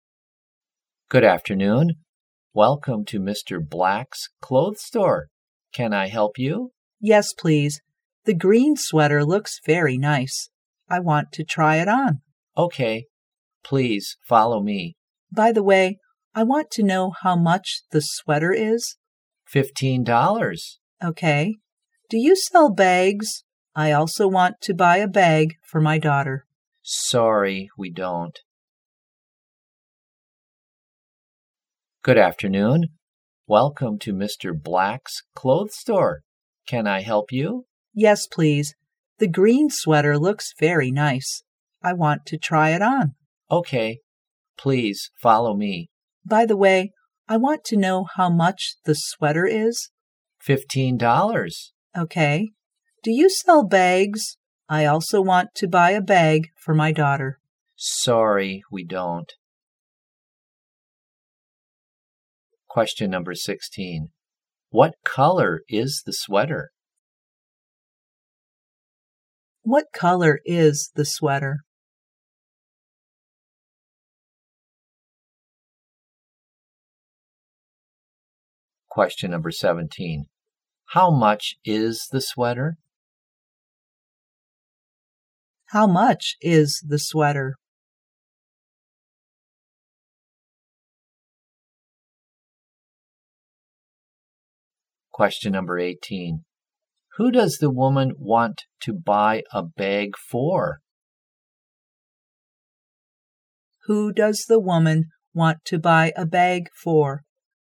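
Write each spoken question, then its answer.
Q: What color is the sweater?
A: Green

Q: How much is the sweater?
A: $15

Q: Who does the woman want to buy a bag for?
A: Her daughter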